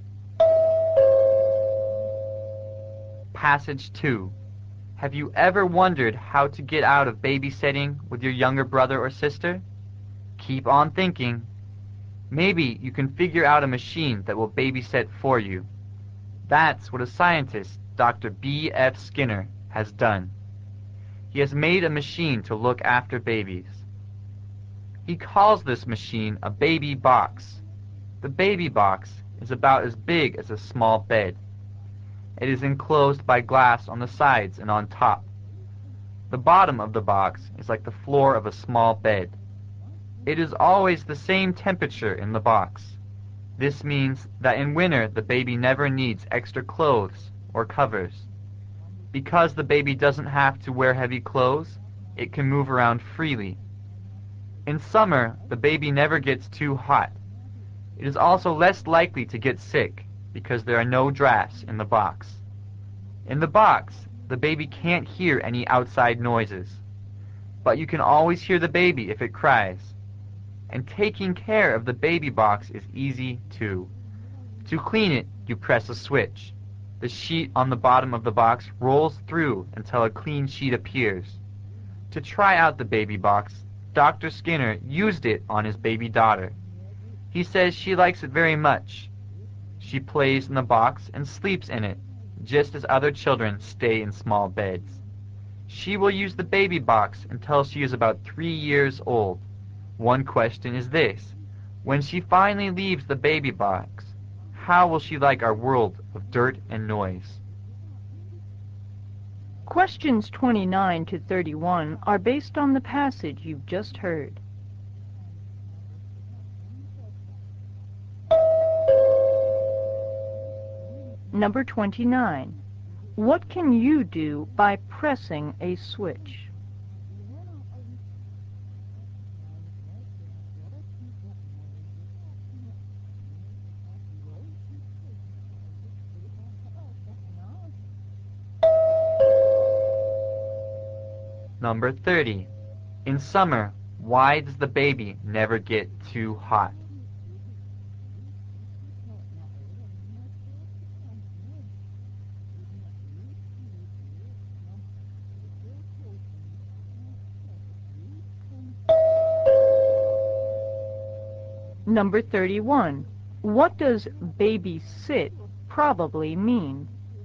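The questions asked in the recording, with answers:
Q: What can you do by pressing a switch?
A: Clean the box by rolling in a clean sheet

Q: In summer, why does the baby never get too hot?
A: The box always stays at the same temperature

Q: What does baby sit probably mean?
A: Look after a baby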